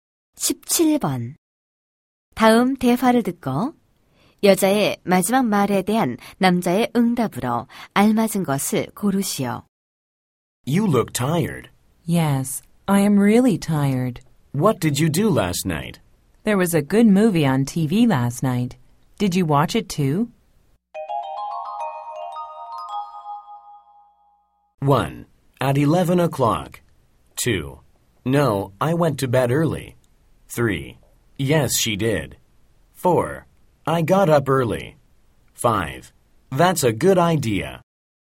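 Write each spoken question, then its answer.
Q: 다음 대화를 듣고 여자의 마지막 말에 대한 남자의 응답으로 알맞은 것을 고르시오.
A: 2: No, I went to bed early.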